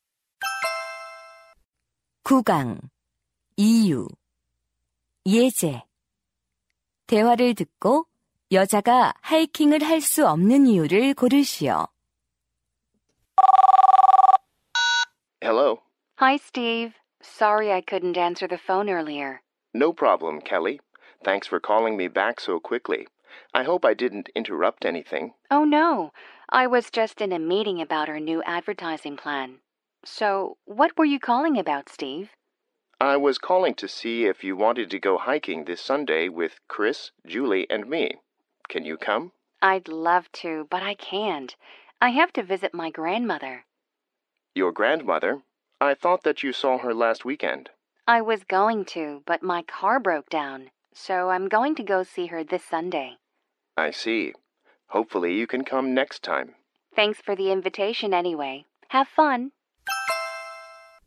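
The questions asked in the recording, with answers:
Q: 대화를 듣고 여자가 하이킹을 할 수 없는 이유를 고르시오.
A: 할머니를 방문해야 해서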